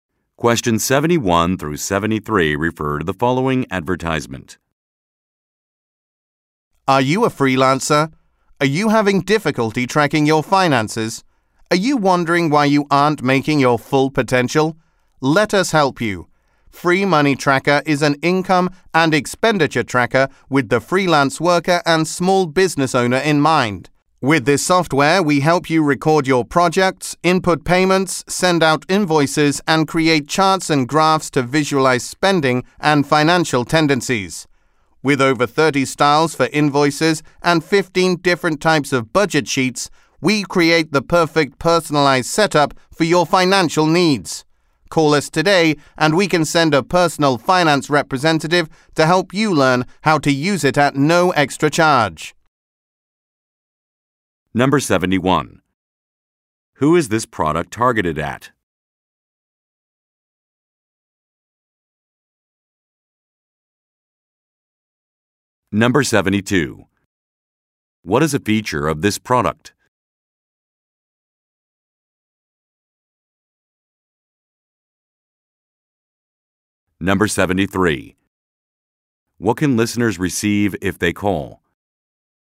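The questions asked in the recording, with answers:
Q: Who is this product targeted at?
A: Freelancers and small business owners

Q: What can listeners receive if they call?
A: A free visit from a personal finance representative to help them learn the software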